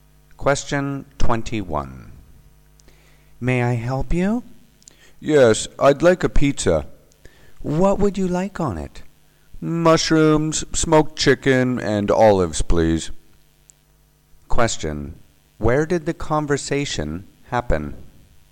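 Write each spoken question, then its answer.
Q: Where did the conversation happen?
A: At a pizza restaurant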